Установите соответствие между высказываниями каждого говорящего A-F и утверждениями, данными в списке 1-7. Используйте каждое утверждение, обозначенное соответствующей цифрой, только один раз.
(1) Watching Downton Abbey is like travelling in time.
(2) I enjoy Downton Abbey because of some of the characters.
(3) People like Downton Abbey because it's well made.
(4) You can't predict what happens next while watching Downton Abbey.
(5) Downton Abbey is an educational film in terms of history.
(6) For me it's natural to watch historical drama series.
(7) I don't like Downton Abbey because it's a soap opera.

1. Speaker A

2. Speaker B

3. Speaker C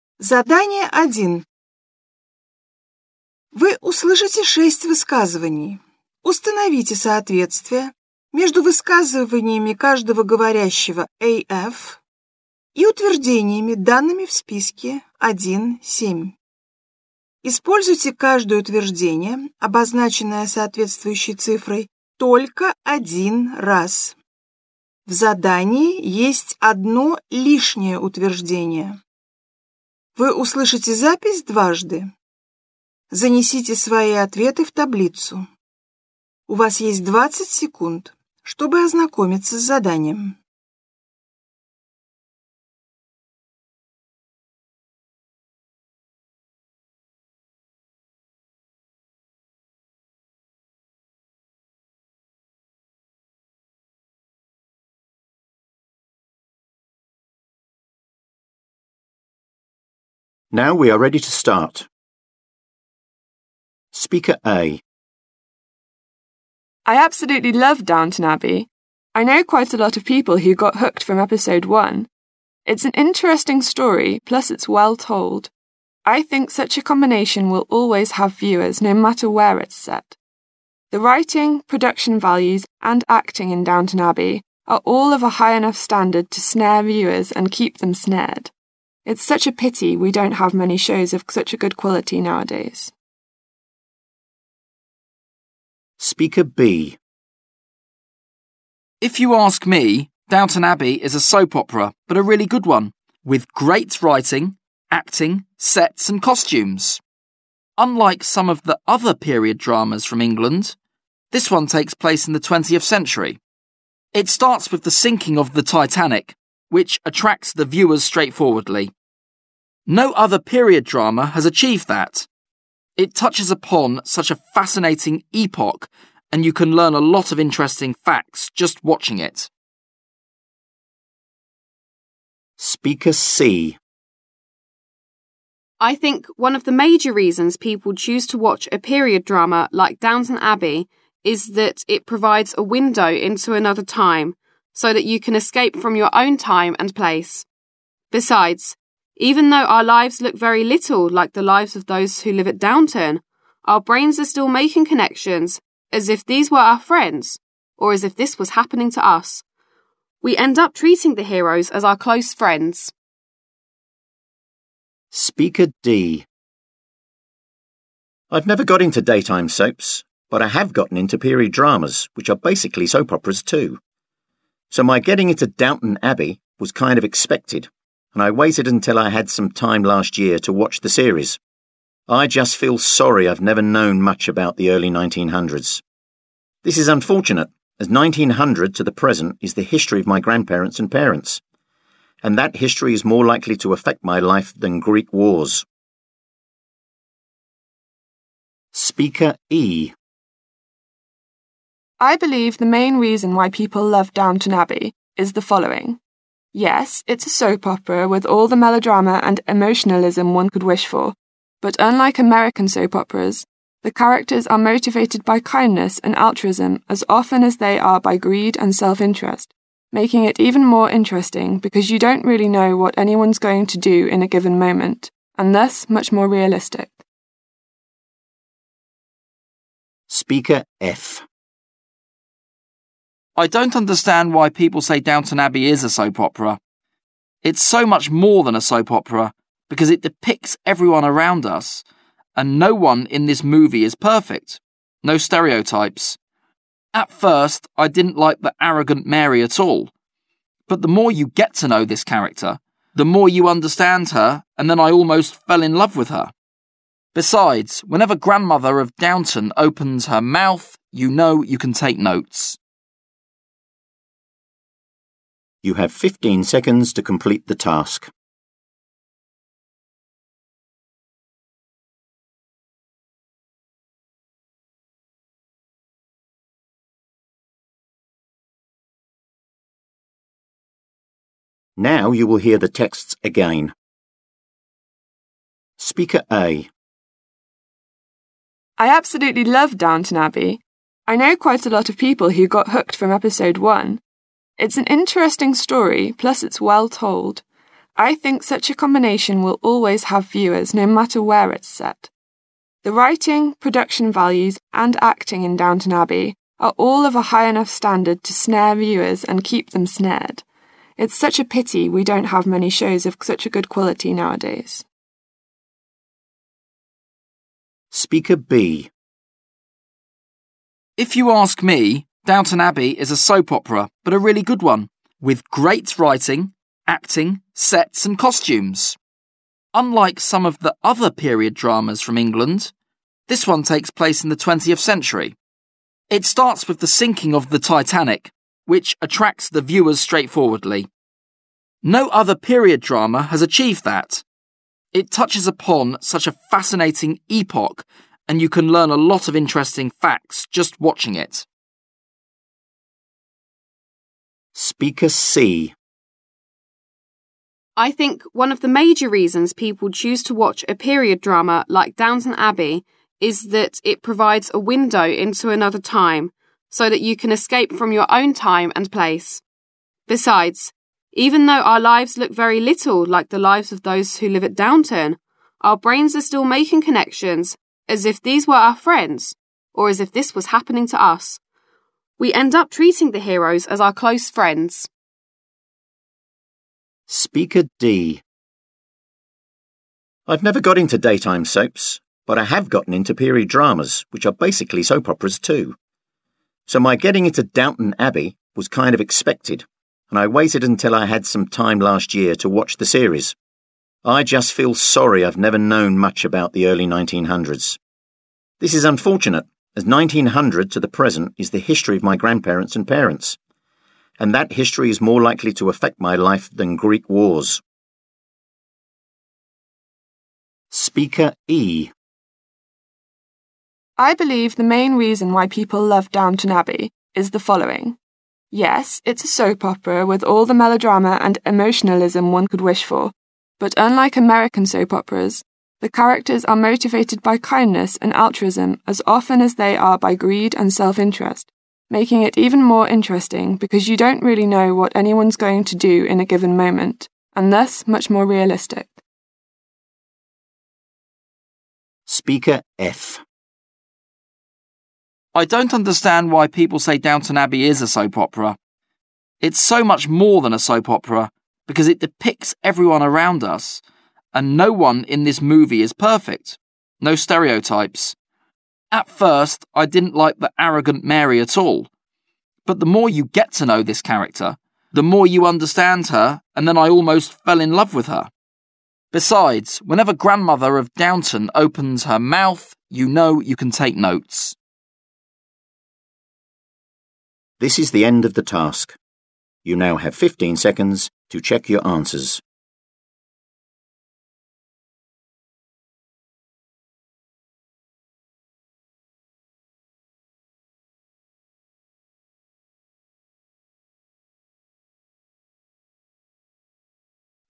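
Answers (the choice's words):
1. People like Downton Abbey because it's well made.
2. Downton Abbey is an educational film in terms of history.
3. Watching Downton Abbey is like travelling in time.

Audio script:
I absolutely love Downton Abbey. I know quite a lot of people who got hooked from episode 1. It's an interesting story, plus it's well told. I think such a combination will always have viewers, no matter where it's set. The writing, production values and acting in Downton Abbey are all of a high enough standard to snare viewers and keep them snared. It's such a pity we don't have many shows of such a good quality nowadays. - Утверждение 3 (People like Downton Abbey because it's well made.
If you ask me, Downton Abbey is a soap opera, but a really good one. With great writing, acting, sets and costumes. Unlike some of the other period dramas from England, this one takes place in the 20th century. 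It starts with the sinking of the Titanic, which attracts the viewers straightforwardly. No other period drama has achieved that. It touches upon such a fascinating epoch and you can learn a lot of interesting facts just watching it. - Утверждение 5 (Downton Abbey is an educational film in terms of history. — Аббатство Даунтон – познавательный исторический фильм) соответствует высказыванию спикера B: «And you can learn a lot of interesting facts just watching it.»
I think one of the major reasons people choose to watch a period drama like Downton Abbey is that it provides a window into another time, so that you can escape from your own time and place. Besides, even though our lives look very little like the lives of those who live at Downton, our brains are still making connections as if these were our friends, or as if this was happening to us. We end up treating the heroes as our close friends. 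- Утверждение 1 (Watching Downton Abbey is like travelling in time.
I've never got into daytime soaps, but I have gotten into period dramas, which are basically soap operas too. So my getting into Downton Abbey was kind of expected, and I waited until I had some time last year to watch the series. I just feel sorry I've never known much about the early 1900s. This is unfortunate, as 1900 to the present is the history of my grandparents and parents, and that history is more likely to affect my life than Greek wars. - Утверждение 6 (For me it's natural to watch historical drama series.
Speaker E
I believe the main reason why people love Downton Abbey is the following. Yes, it's a soap opera with all the melodrama and emotionalism one could wish for, but unlike American soap operas, the characters are motivated by kindness and altruism as often as they are by greed and self-interest, making it even more interesting because you don't really know what anyone's going to do in a given moment, and thus much more realistic. 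making it even more interesting because you don't really know what anyone's going to do in a given moment.»
Speaker F
I don't understand why people say Downton Abbey is a soap opera. It's so much more than a soap opera, because it depicts everyone around us, and no one in this movie is perfect. No stereotypes. At first, I didn't like the arrogant Mary at all. But the more you get to know this character, the more you understand her, and then I almost fell in love with her. — Мне нравится Аббатство Даунтон из-за некоторых персонажей) соответствует высказыванию спикера F: «Besides whenever grandmother of Downton opens her mouth you know you can take notes.»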